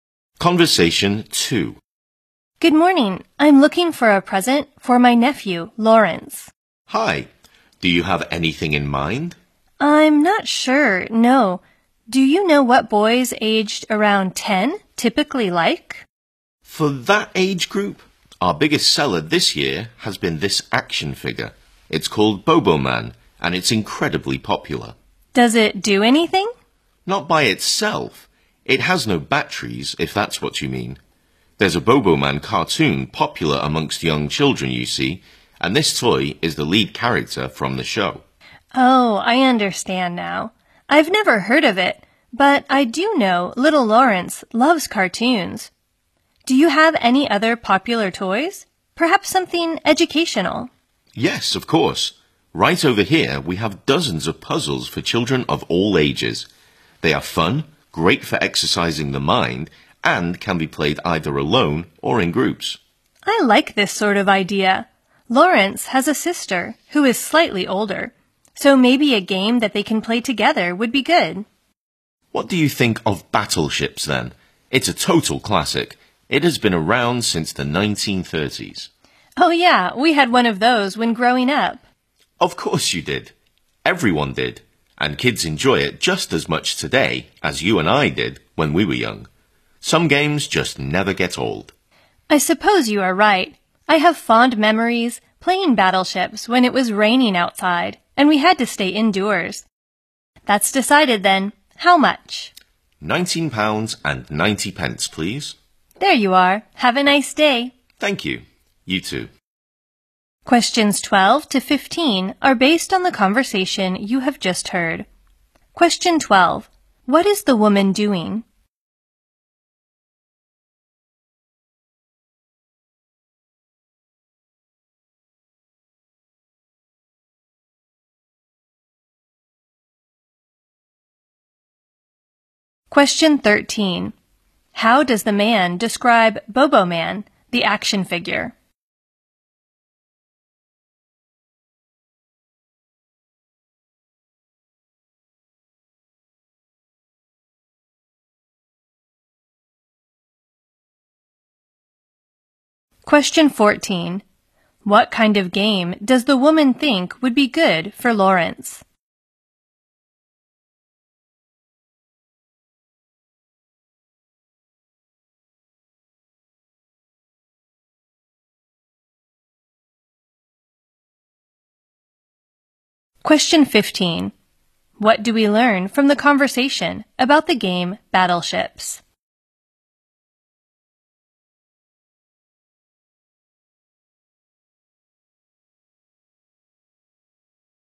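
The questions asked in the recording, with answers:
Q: What is the woman doing?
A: Buying a present for her nephew

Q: How does the man describe Bobo Man, the action figure?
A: It is incredibly popular, the lead character of a cartoon

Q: What kind of game does the woman think would be good for Lawrence?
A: One he can play together with his sister

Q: What do we learn from the conversation about the game Battleships?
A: It is a classic that has been around since the 1930s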